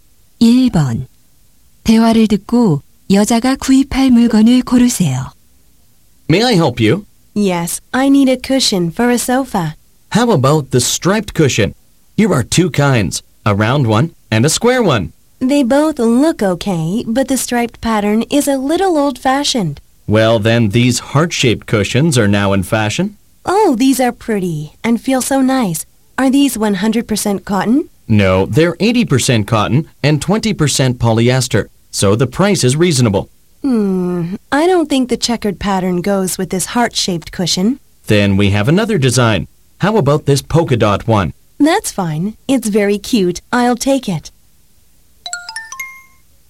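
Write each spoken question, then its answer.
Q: 대화를 듣고 여자가 구입할 물건을 고르세요.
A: 물방울 무늬 하트 모양 쿠션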